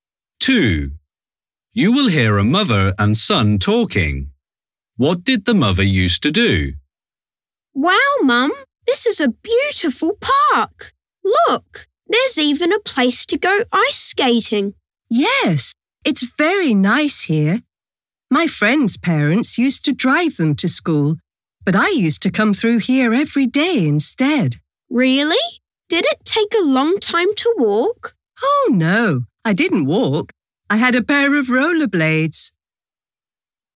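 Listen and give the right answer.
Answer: She went rollerblading through the park to school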